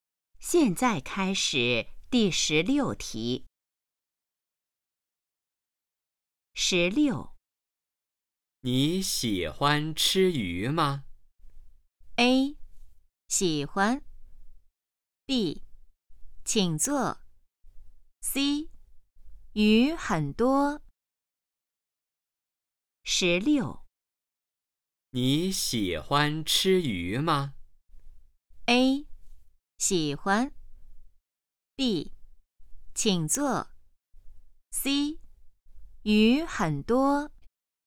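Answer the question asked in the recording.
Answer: A: 喜欢。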